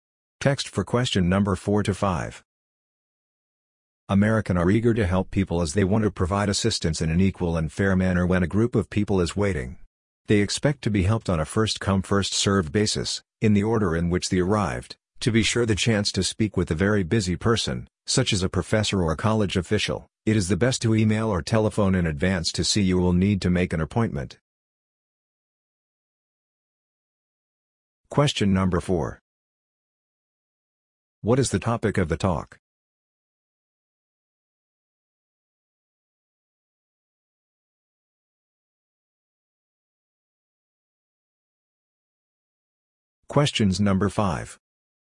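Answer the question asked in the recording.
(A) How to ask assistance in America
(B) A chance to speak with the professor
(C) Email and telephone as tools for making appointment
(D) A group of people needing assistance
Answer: (A) How to ask assistance in America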